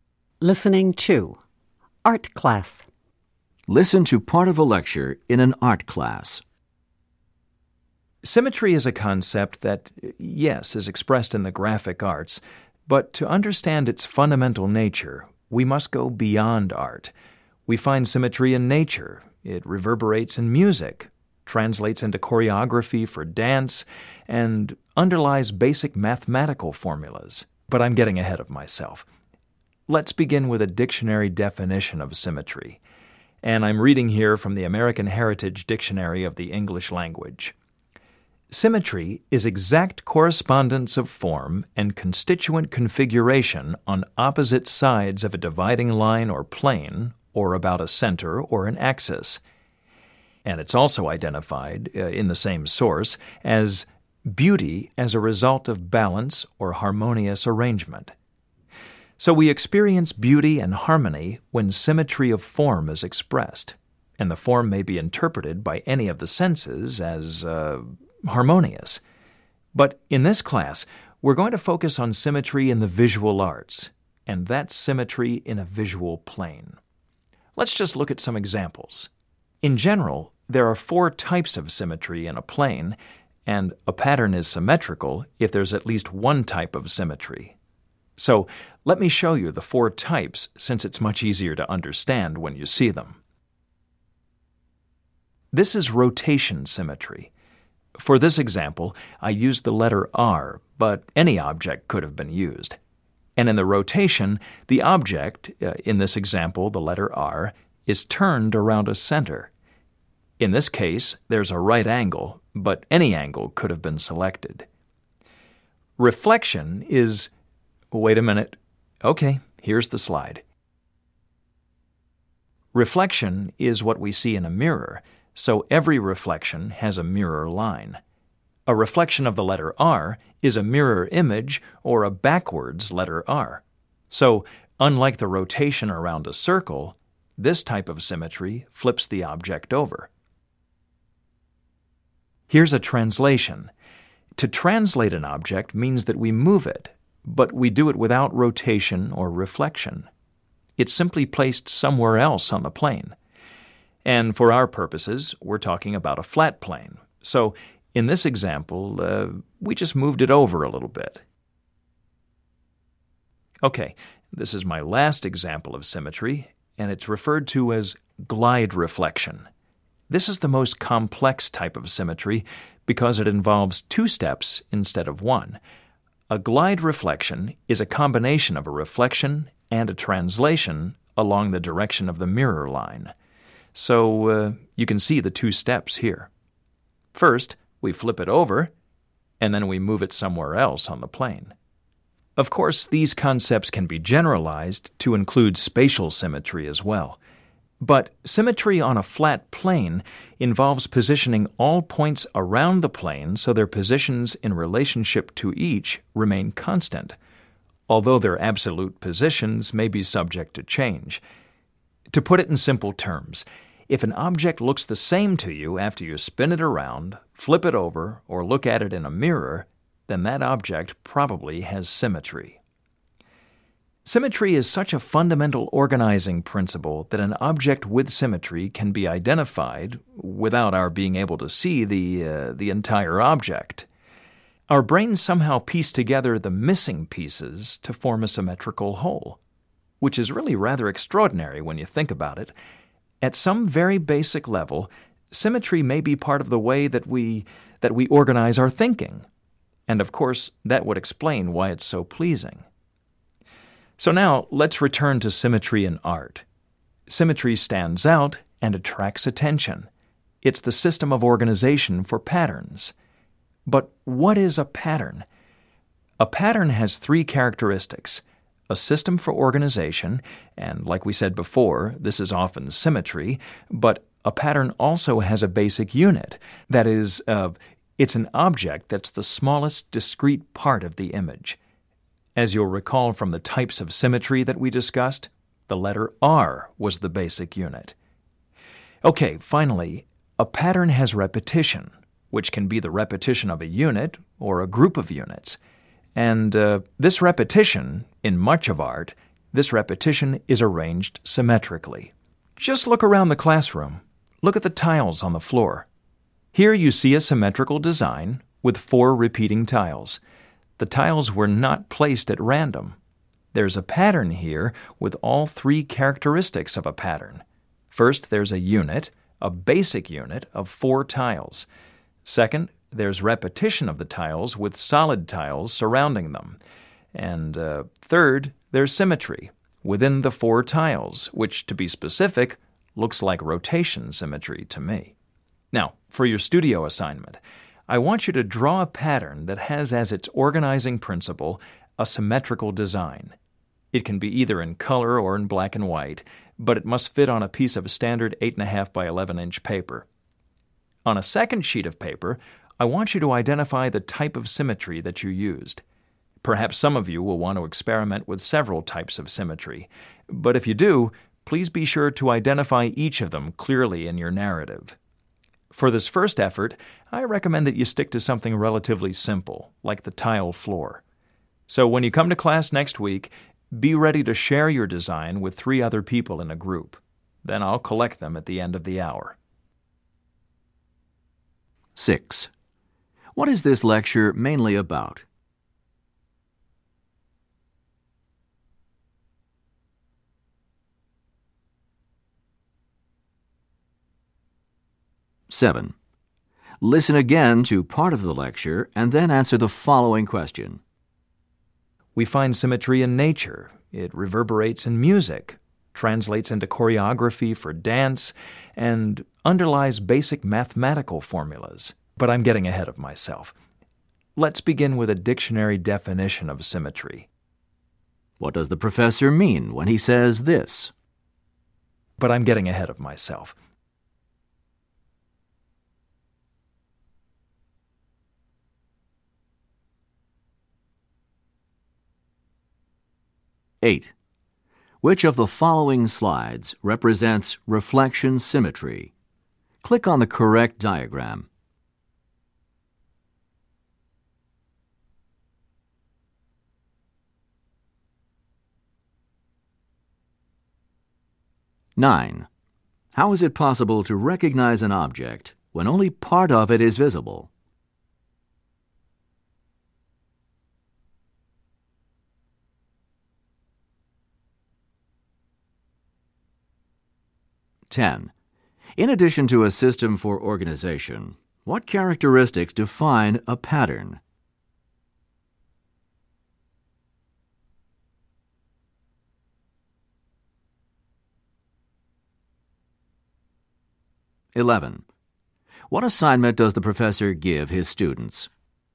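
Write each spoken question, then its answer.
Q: What is this lecture mainly about?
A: Symmetry in the visual arts and its types

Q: How is it possible to recognize an object when only part of it is visible?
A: Our brains fill in the missing pieces to form a symmetrical whole

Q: In addition to a system for organization, what characteristics define a pattern?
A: A basic unit and repetition

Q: What assignment does the professor give his students?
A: Draw a symmetrical pattern and identify the type of symmetry used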